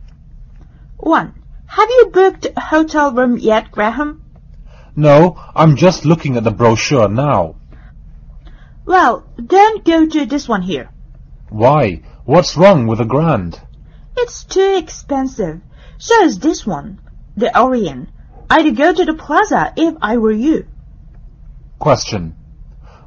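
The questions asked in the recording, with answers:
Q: Which hotel does Graham's colleague recommend?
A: The Plaza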